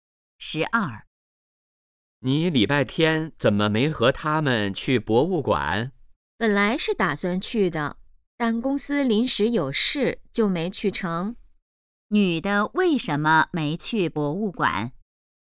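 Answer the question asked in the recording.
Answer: 公司临时有事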